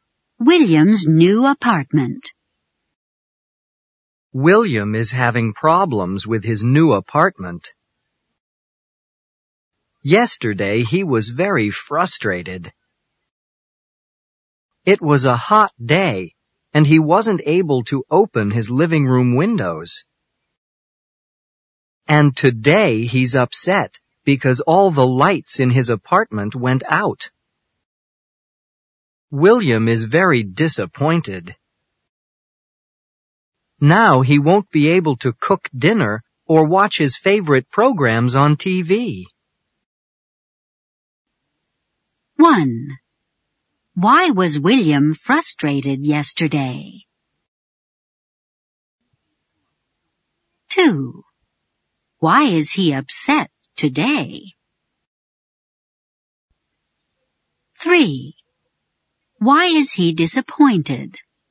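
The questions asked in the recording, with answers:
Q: Why was William frustrated yesterday?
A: He wasn't able to open his living room windows.

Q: Why is he upset today?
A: All the lights in his apartment went out.

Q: Why is he disappointed?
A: He won't be able to cook dinner or watch his favorite programs on TV.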